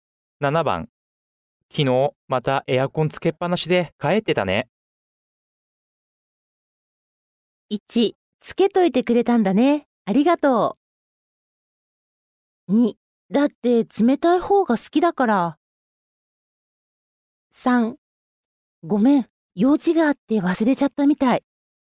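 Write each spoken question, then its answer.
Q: 昨日またエアコンつけっぱなしで帰ってたね。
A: 3: ごめん、用事があって忘れちゃったみたい。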